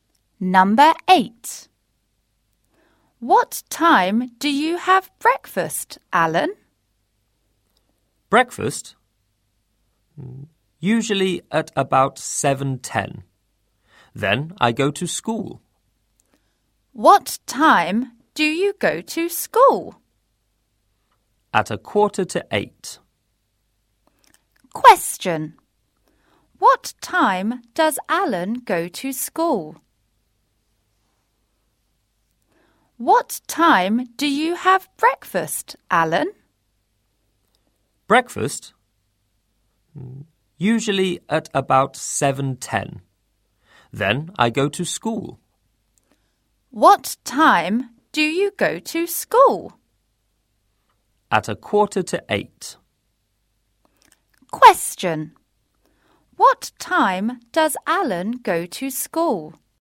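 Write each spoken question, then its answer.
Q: What time does Alan go to school?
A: At 7:45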